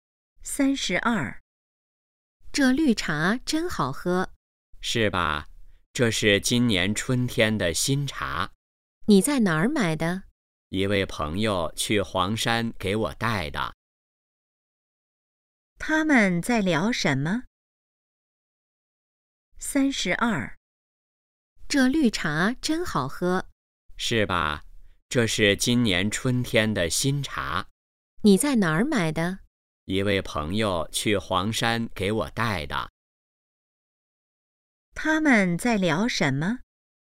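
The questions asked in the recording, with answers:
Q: 他们在聊什么?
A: 绿茶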